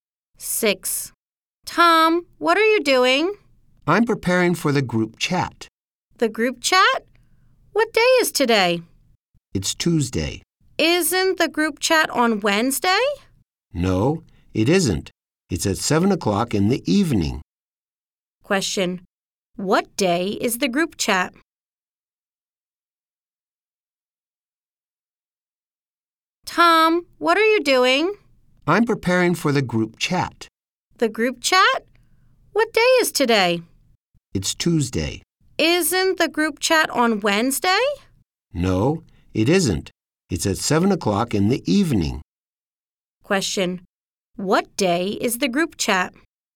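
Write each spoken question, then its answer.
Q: What day is the group chat?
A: Tuesday (today)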